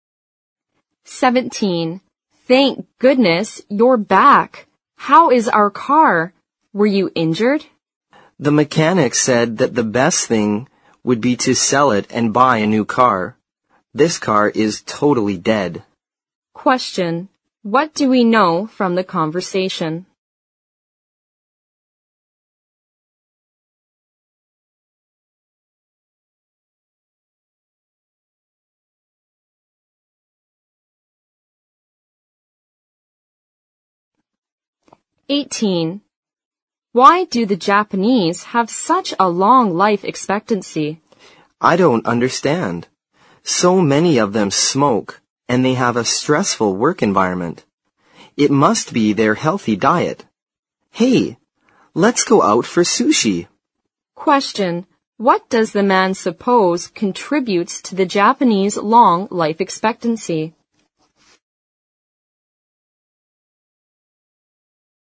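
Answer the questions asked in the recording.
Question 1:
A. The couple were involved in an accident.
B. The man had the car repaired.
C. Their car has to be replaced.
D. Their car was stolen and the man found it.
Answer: C. Their car has to be replaced.
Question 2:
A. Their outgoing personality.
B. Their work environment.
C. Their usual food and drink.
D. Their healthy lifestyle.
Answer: C. Their usual food and drink.

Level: 四级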